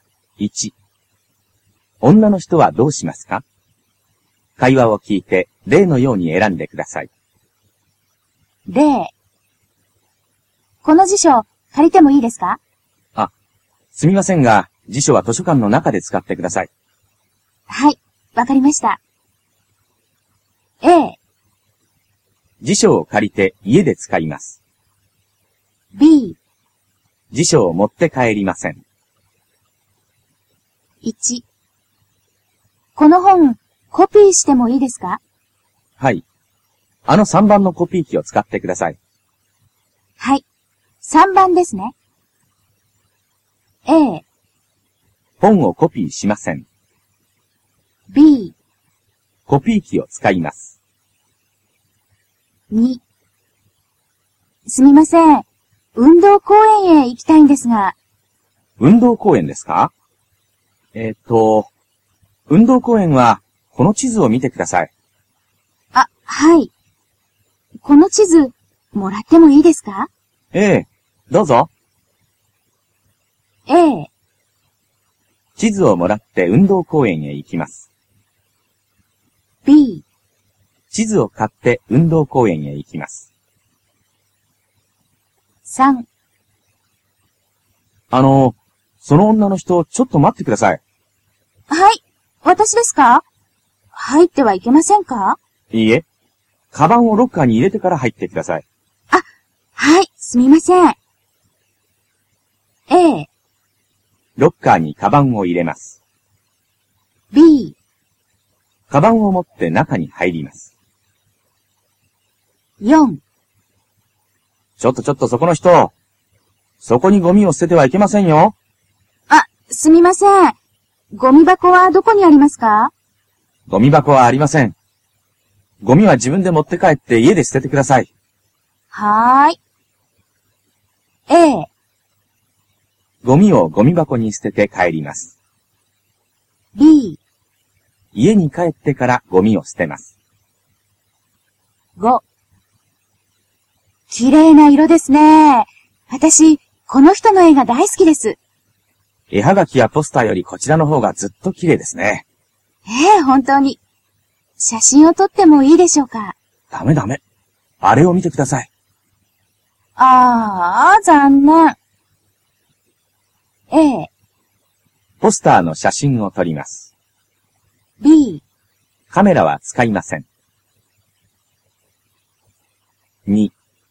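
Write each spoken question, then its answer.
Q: 女の人はどうしますか?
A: B: コピー機を使います。

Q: 女の人はどうしますか?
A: A: 地図をもらって運動公園へ行きます。

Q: 女の人はどうしますか?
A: A: ロッカーにカバンを入れます。

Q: 女の人はどうしますか?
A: B: 家に帰ってからゴミを捨てます。

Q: 女の人はどうしますか?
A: B: カメラは使いません。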